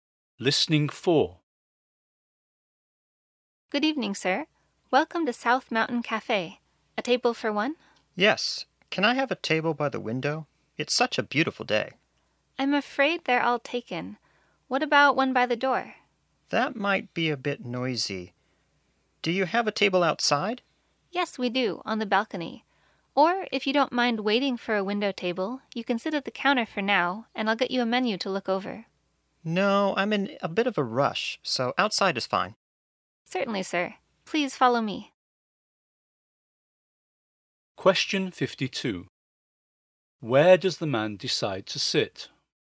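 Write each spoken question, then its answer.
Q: Where does the man decide to sit?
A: Outside on the balcony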